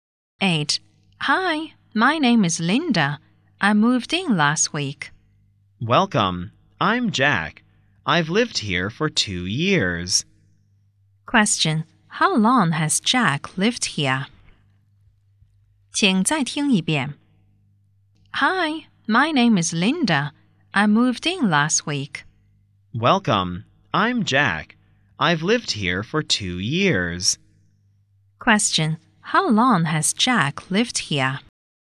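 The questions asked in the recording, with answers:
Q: How long has Jack lived here?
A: For 2 years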